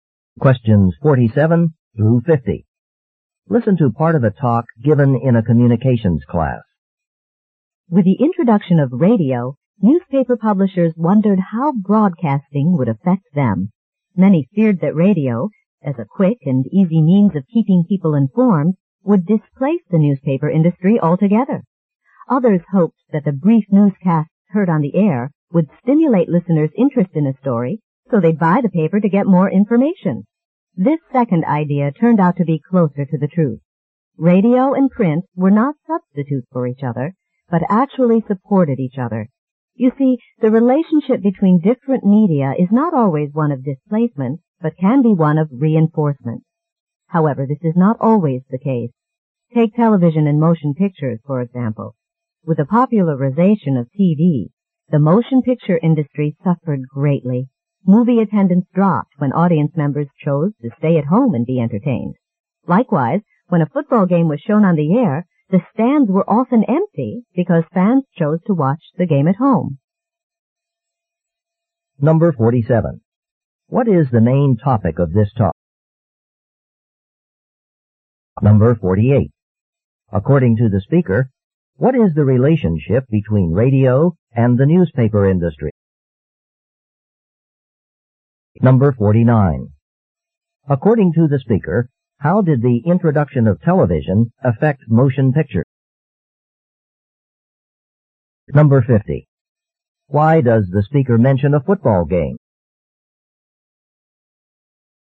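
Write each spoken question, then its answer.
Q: What is the main topic of this talk?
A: How different media affect each other

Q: According to the speaker, what is the relationship between radio and the newspaper industry?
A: They support each other

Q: According to the speaker, how did the introduction of television affect motion pictures?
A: Movie attendance dropped

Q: Why does the speaker mention a football game?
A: As another example of TV keeping audiences at home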